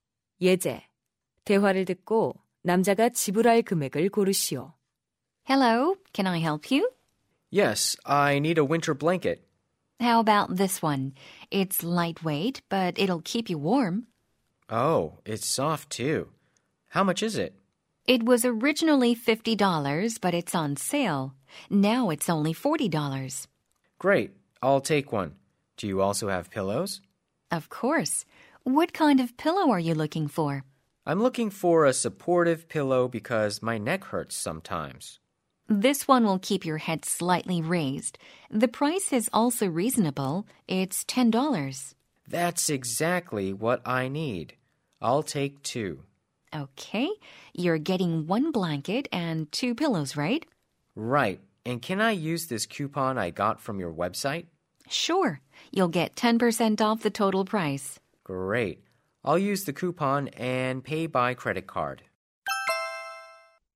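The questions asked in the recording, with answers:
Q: 대화를 듣고 남자가 지불할 금액을 고르시오.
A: $54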